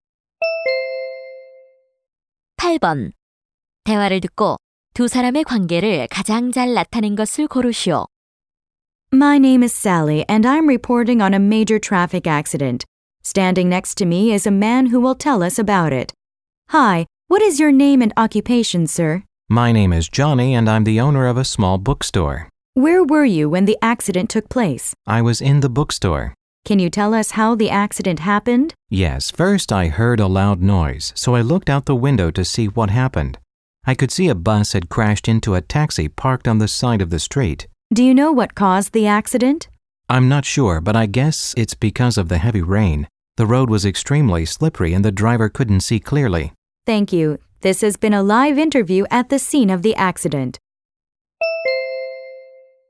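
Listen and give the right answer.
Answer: 기자와 사고 목격자(서점 주인)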